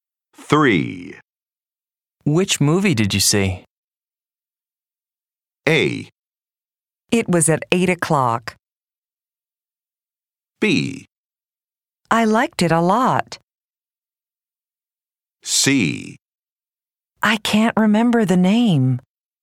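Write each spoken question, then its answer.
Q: Which movie did you see?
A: C: I can't remember the name.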